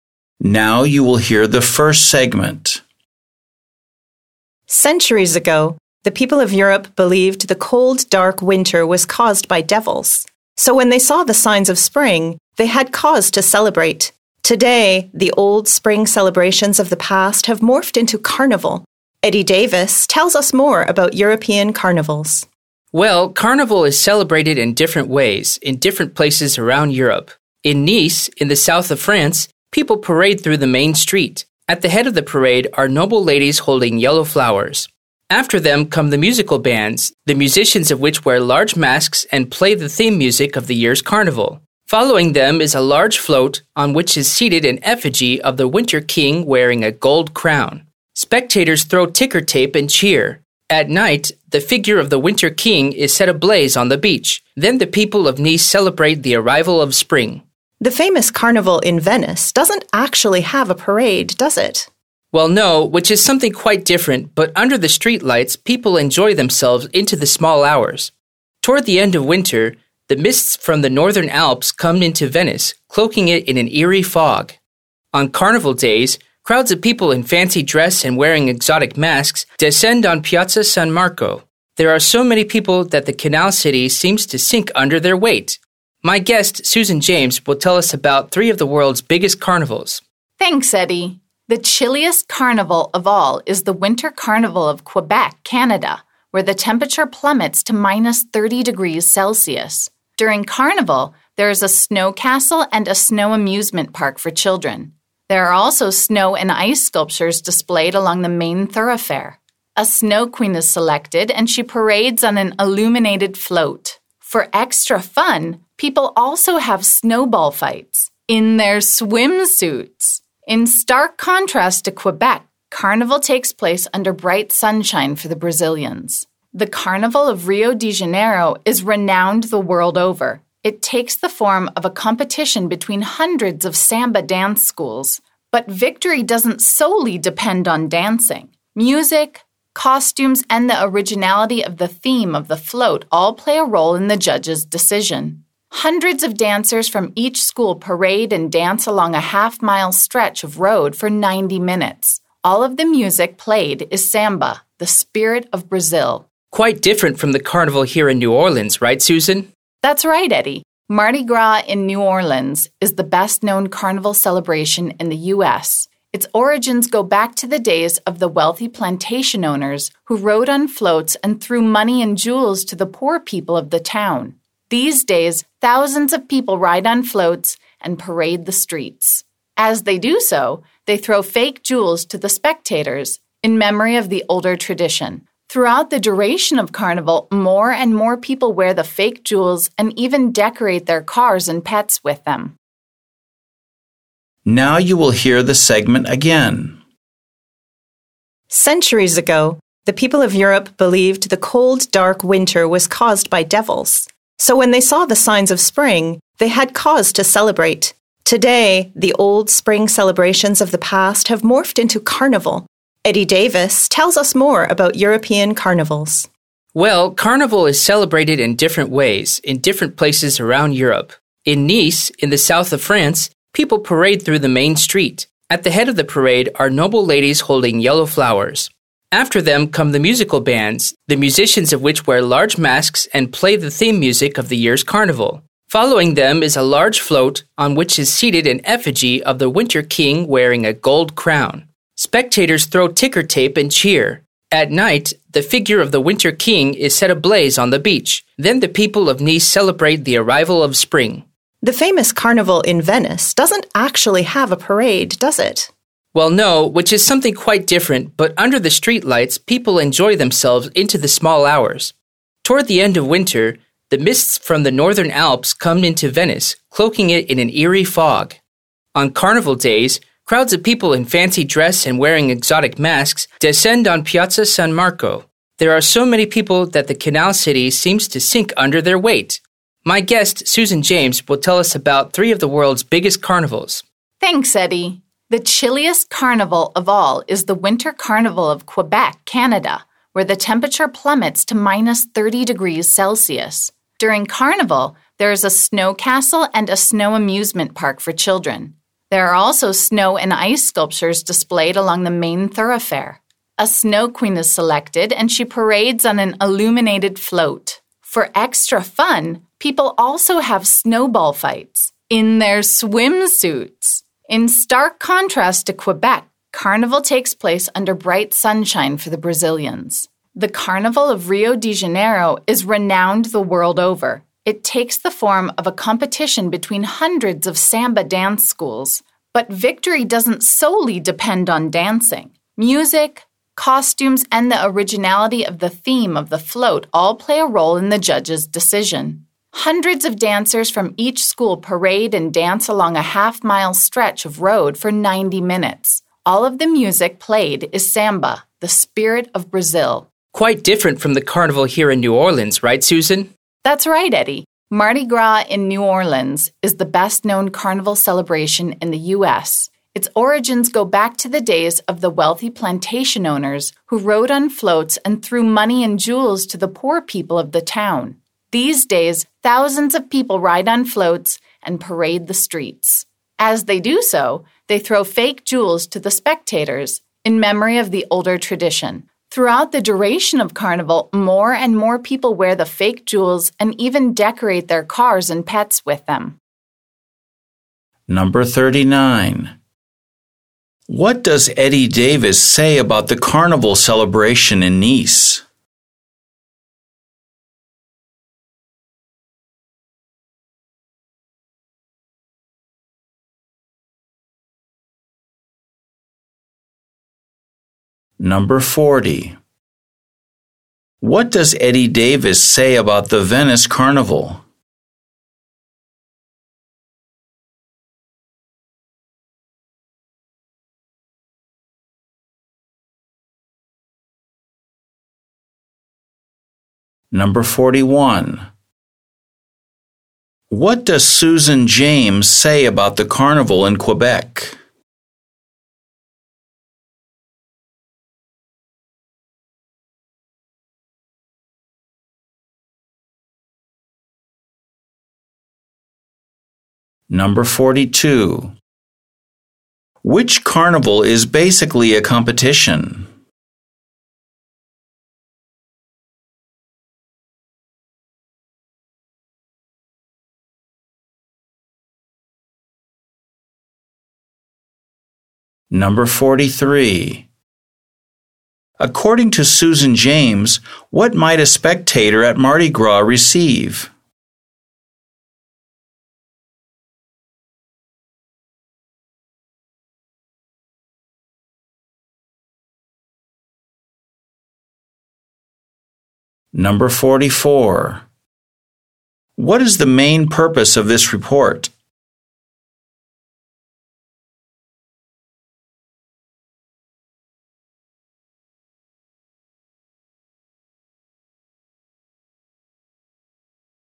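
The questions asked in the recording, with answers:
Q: Which carnival is basically a competition?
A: The Carnival of Rio de Janeiro

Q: According to Susan James, what might a spectator at Mardi Gras receive?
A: Fake jewels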